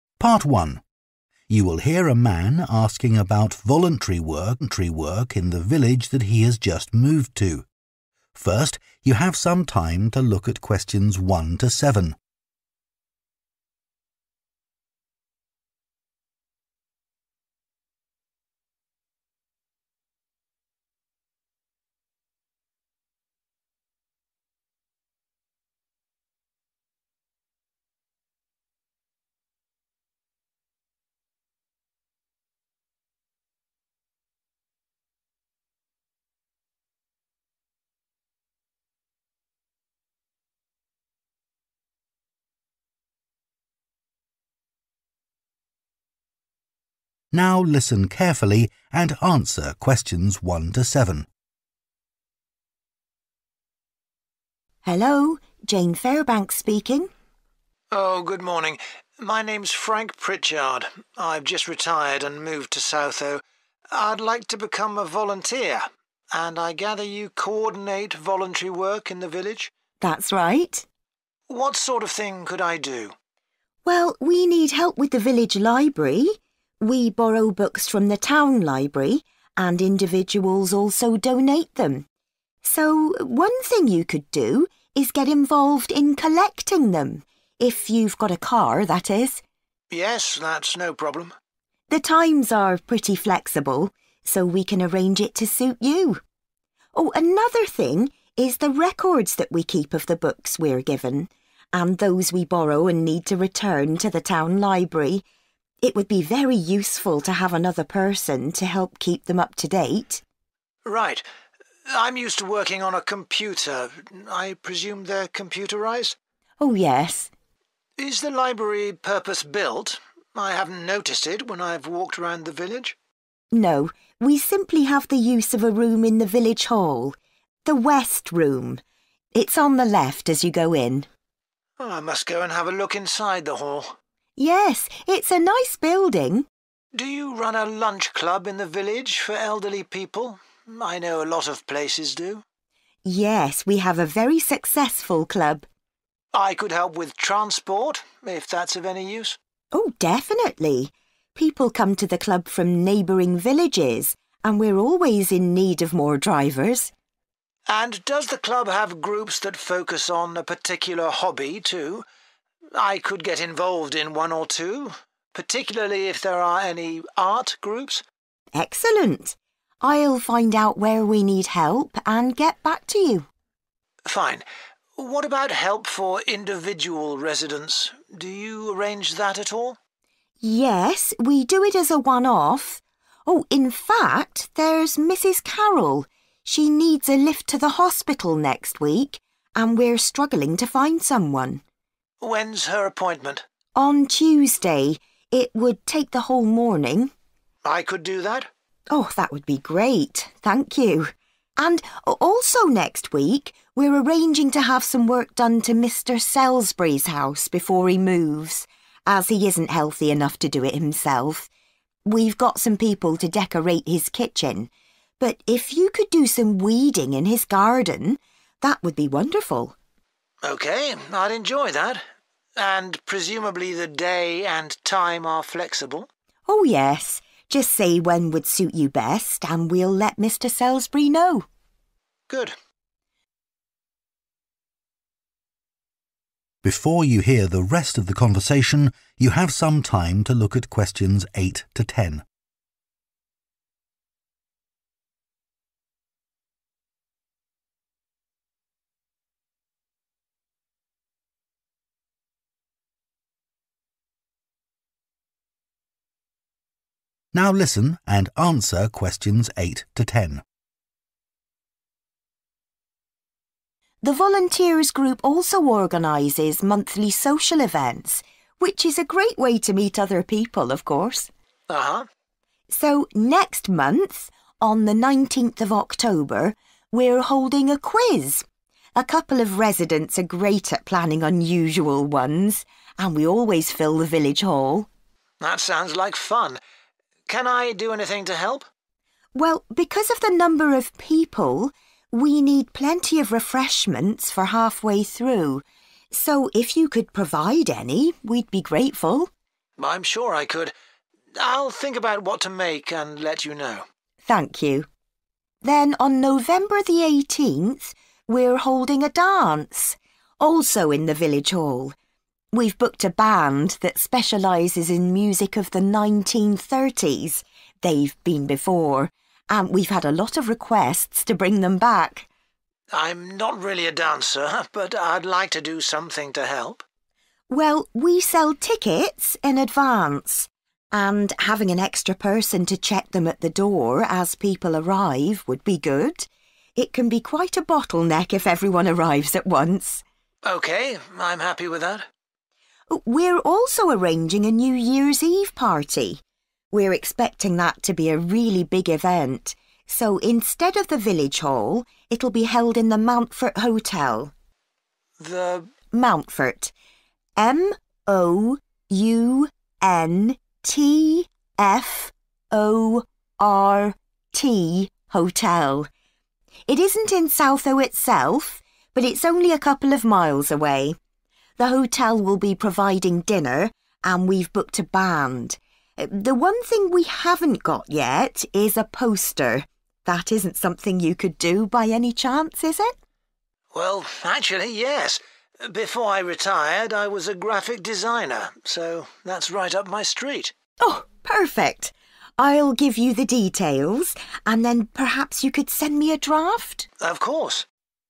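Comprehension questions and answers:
Complete the notes below.Write ONE WORD ONLY for each answer.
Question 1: Help with 1 ..... books (times to be arranged)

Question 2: Help needed to keep 2 ....... of books up to date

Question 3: Library is in the 3 ..... Room in the village hall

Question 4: Help by providing 4 ...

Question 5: Help with hobbies such as 5 ....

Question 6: Taking Mrs Carroll to 6 .....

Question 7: Work in the 7 ...... at Mr Selsbury's house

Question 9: checking 9 ....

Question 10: designing the 10 .....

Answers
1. collecting
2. records
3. West
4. transport
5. art
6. hospital
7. garden
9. tickets
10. poster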